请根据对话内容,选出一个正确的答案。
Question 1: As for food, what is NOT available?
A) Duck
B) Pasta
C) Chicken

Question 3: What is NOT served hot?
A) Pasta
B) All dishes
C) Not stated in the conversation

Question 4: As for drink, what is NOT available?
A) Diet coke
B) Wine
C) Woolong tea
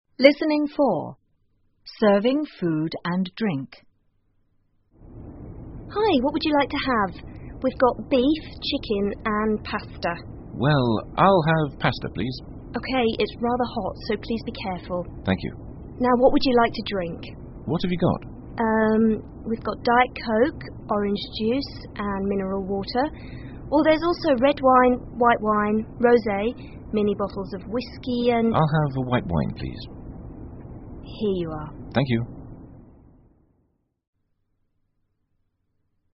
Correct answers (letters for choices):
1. A
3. C
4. C